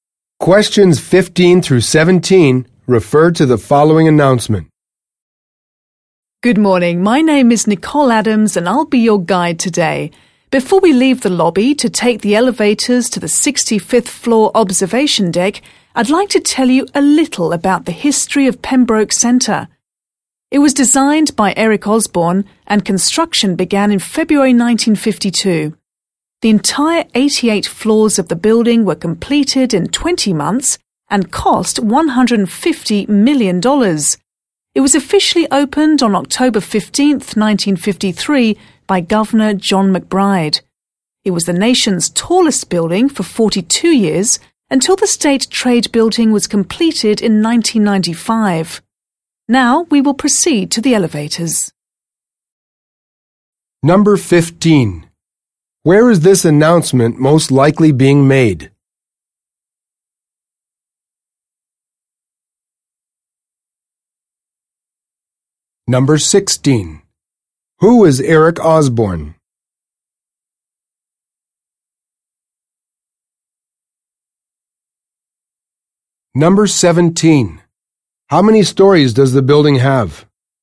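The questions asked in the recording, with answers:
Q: Where is this announcement most likely being made?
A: In the lobby of Pembroke Centre

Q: Who is Eric Osborne?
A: The building's designer

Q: How many stories does the building have?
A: 88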